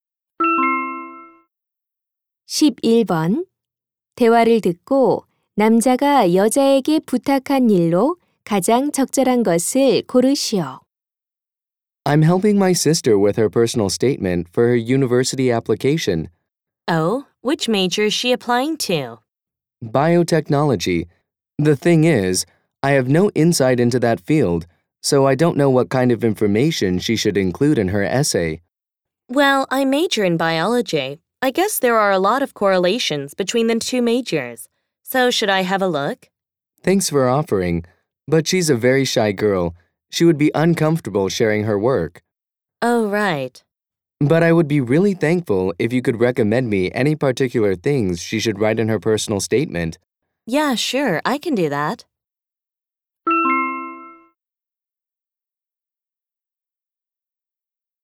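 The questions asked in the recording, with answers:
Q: 대화를 듣고 남자가 여자에게 부탁한 일로 가장 적절한 것을 고르시오.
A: 자기소개서에 쓸 내용 추천해 주기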